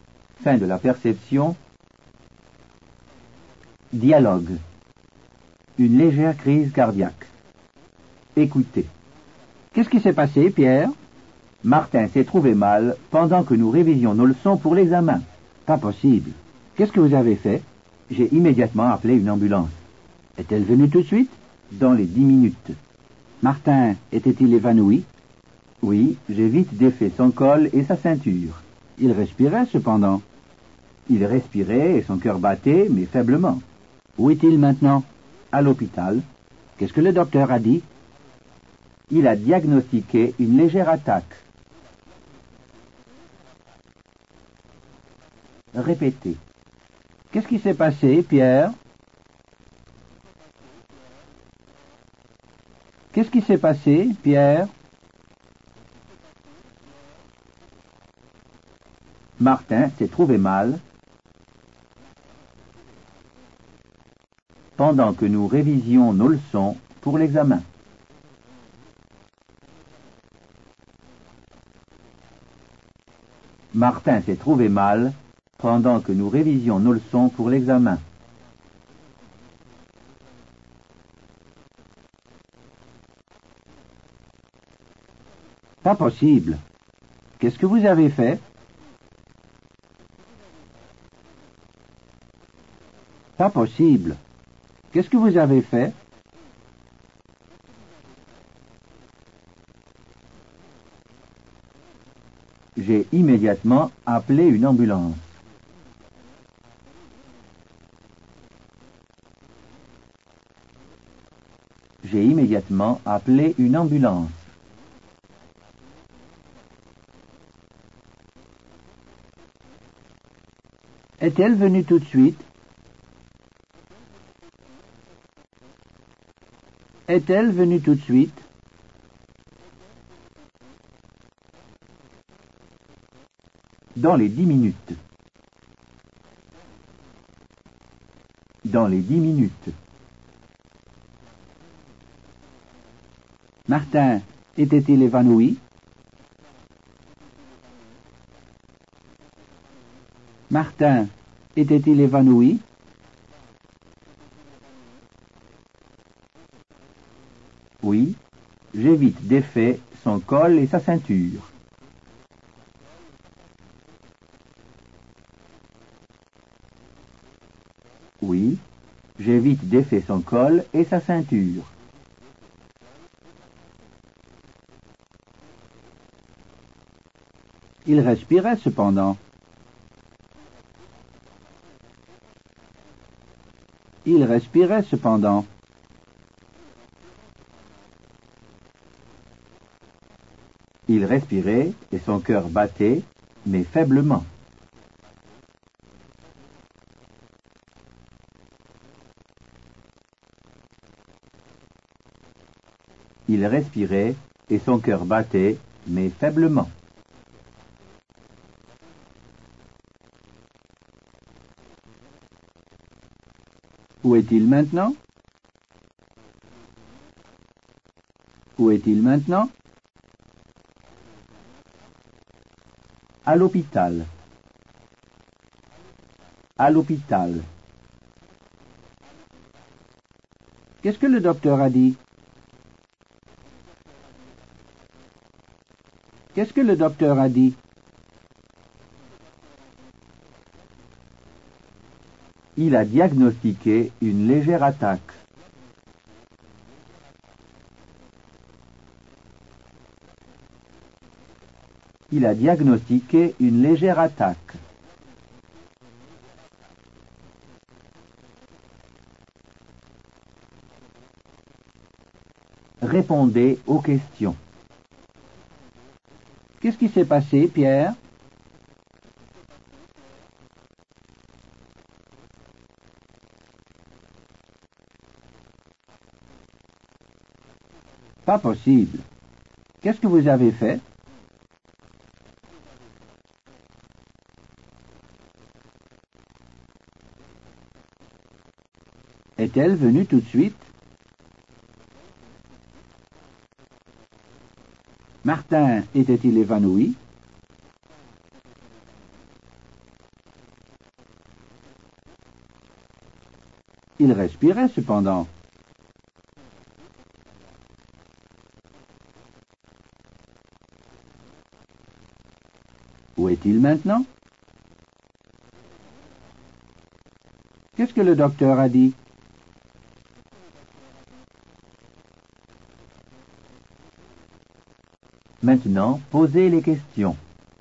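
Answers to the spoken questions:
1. Martin s'est trouvé mal pendant qu'ils révisaient leurs leçons pour l'examen.
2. J'ai immédiatement appelé une ambulance.
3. Dans les 10 minutes.
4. Oui, j'ai vite défait son col et sa ceinture.
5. Il respirait et son cœur battait, mais faiblement.
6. À l'hôpital.
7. Il a diagnostiqué une légère attaque.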